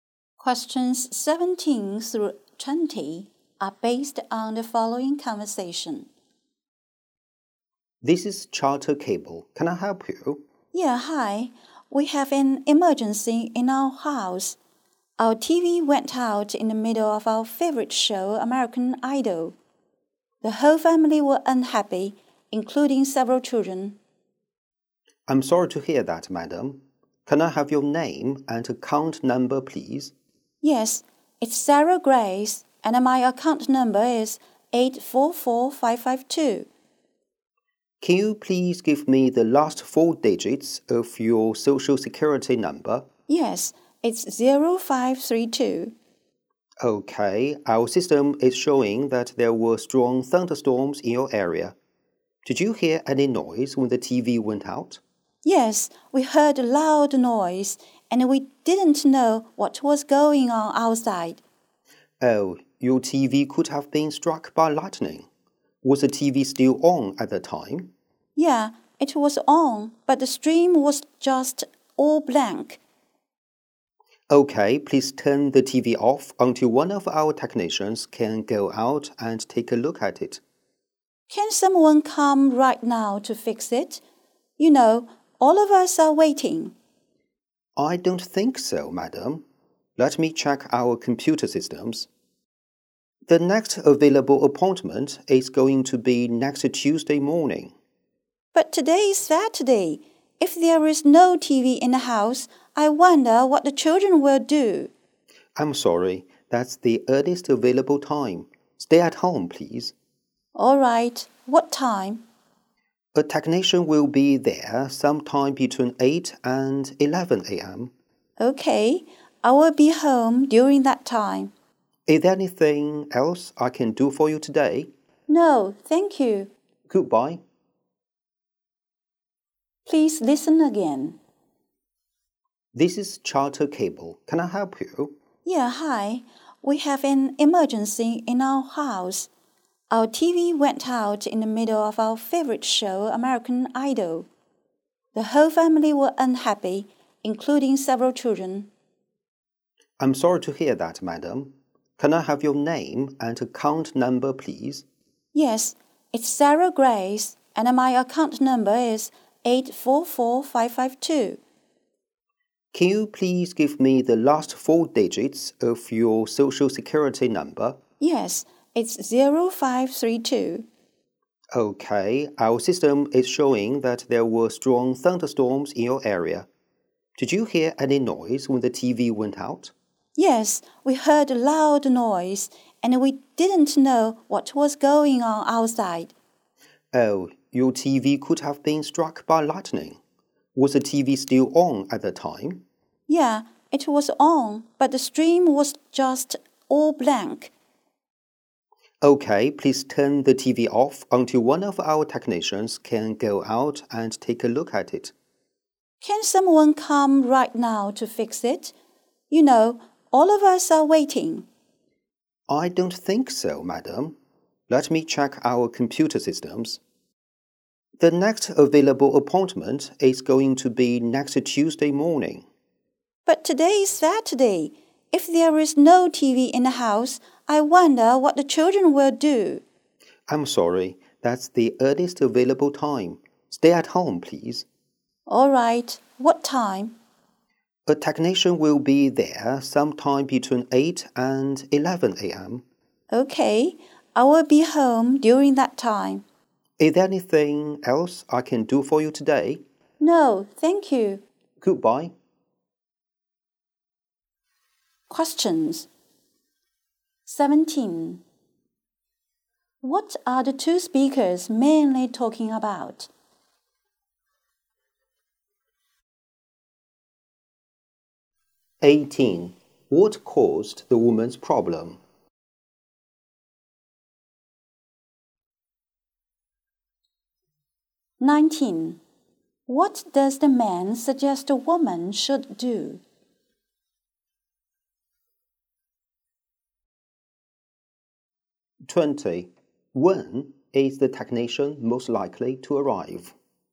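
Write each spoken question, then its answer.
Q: What are the two speakers mainly talking about?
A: Getting a broken TV fixed

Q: What caused the woman's problem?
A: Lightning probably struck the TV during a thunderstorm

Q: What does the man suggest the woman should do?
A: Turn the TV off until a technician comes

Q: When is the technician most likely to arrive?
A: Next Tuesday between 8 and 11 a.m.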